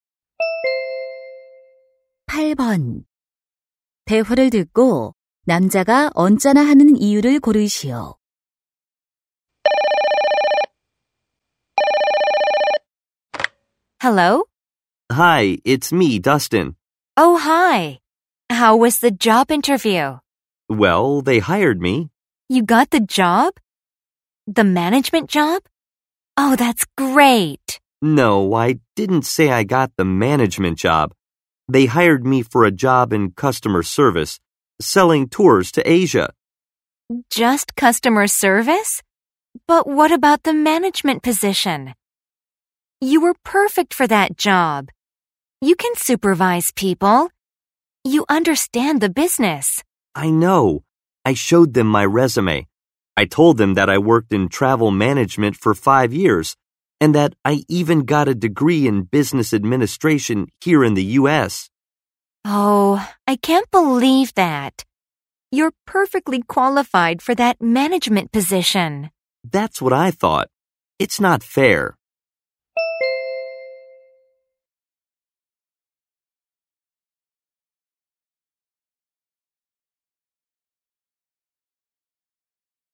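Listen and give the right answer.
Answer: 관리직이 아닌 고객 서비스직으로 채용되어서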